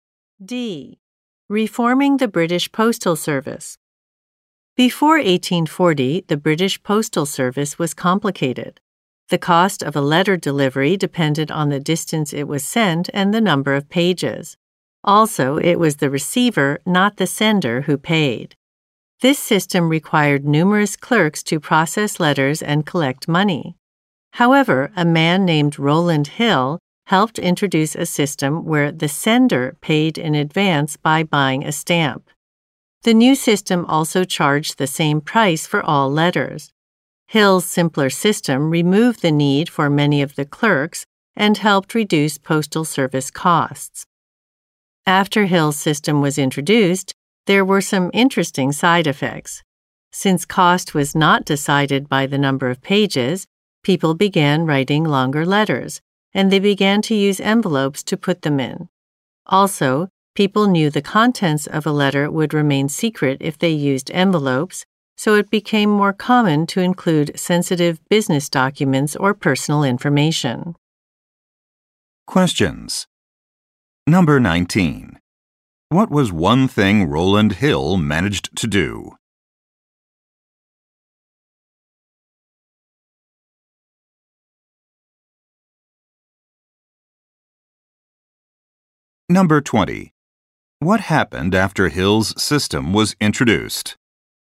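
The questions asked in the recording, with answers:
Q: What was one thing Rowland Hill managed to do?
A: He helped introduce a simpler system in which the sender paid in advance with a stamp, which reduced postal costs.

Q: What happened after Hill's system was introduced?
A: People wrote longer letters and began using envelopes, including for sensitive information.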